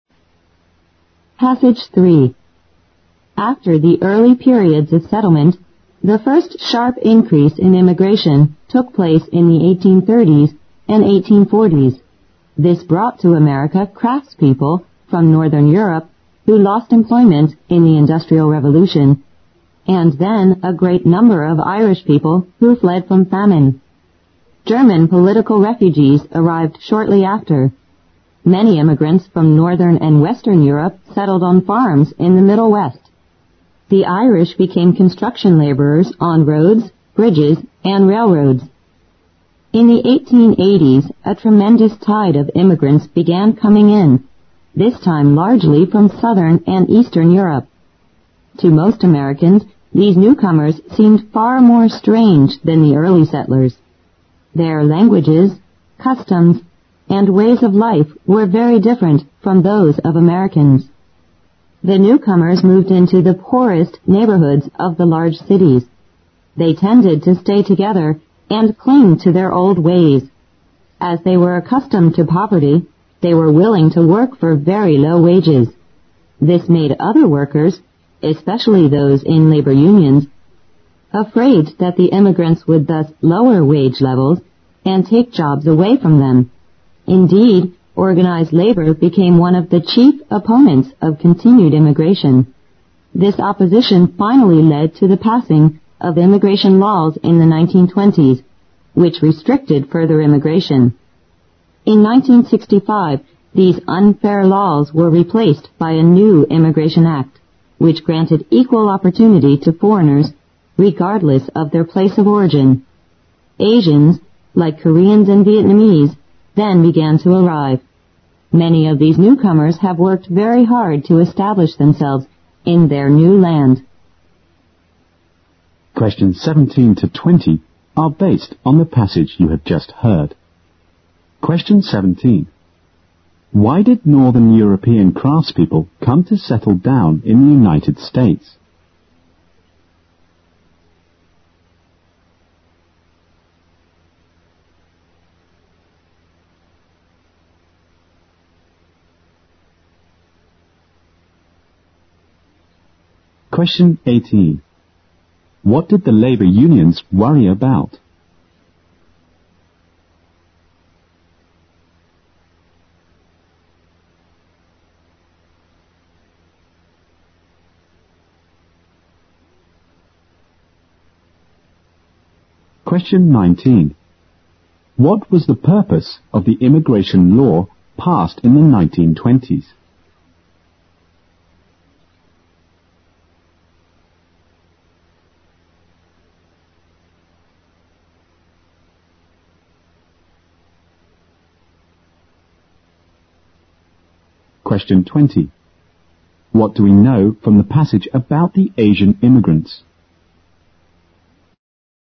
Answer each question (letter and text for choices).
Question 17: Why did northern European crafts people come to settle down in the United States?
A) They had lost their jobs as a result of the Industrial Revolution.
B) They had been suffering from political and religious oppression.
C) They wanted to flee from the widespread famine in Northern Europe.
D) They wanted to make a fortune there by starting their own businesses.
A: A) They had lost their jobs as a result of the Industrial Revolution.

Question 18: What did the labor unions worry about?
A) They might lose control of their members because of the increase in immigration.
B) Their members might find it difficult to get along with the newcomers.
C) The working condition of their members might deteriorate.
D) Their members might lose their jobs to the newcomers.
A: D) Their members might lose their jobs to the newcomers.

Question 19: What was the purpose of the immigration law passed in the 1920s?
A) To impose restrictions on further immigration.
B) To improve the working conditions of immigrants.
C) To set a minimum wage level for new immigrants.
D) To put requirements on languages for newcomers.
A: A) To impose restrictions on further immigration.

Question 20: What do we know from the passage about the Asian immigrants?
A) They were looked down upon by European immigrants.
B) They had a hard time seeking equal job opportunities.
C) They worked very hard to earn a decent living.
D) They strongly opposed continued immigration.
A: C) They worked very hard to earn a decent living.

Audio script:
After the early period of settlement, the first sharp increase in immigration took place in the 1830s and 1840s. This brought to America crafts people from northern Europe who lost employment in the Industrial Revolution(17), and then a great number of Irish people who fled from famine. German political refugees arrived shortly after. Many immigrants from northern and western Europe settled on farms in the Middle West. The Irish became construction labors on roads, bridges and railroads. In the 1880s, a tremendous tide of immigrants began to come in. This time, largely from southern and eastern Europe. To most Americans, these newcomers seemed far more strange than the early settlers. Their languages, customs and ways of life were very different from those of Americans. The newcomers moved into the poorest neighborhoods of the large cities. They tended to stay together and cling to their old ways. As they were accustomed to poverty, they were willing to work for very low wages. This made other workers, especially those in labor unions afraid that the immigrants would thus lower wage levels and take jobs away from them(18). Indeed, organized labor became one of the chief opponents of continued immigration. This opposition finally led to the passing of immigration laws in the 1920s which restricted further immigration(19). In 1965, these unfair laws were replaced by a new immigration act which granted equal opportunity to foreigners regardless of the place or origin. Asians, like Koreans and Vietnamese, then began to arrive. Many of these newcomers have worked very hard to establish themselves in their new land(20).

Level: 英语六级